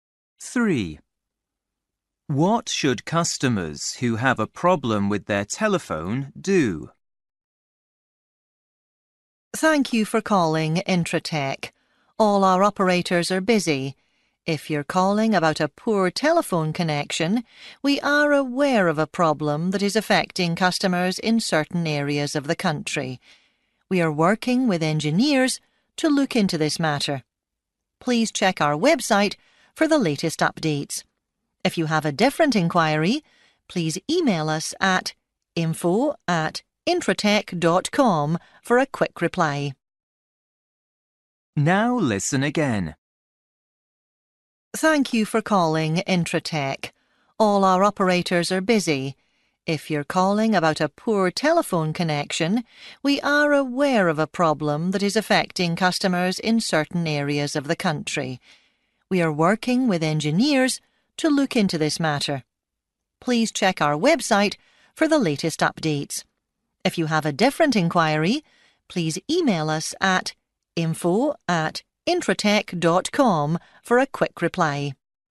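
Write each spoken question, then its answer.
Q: What should customers who have a problem with their telephone do?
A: Check the website for the latest updates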